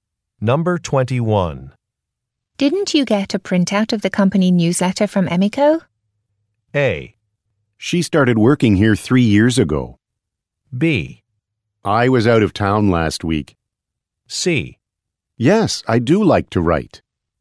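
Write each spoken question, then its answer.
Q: Didn't you get a printout of the company newsletter from Emiko?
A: B: I was out of town last week.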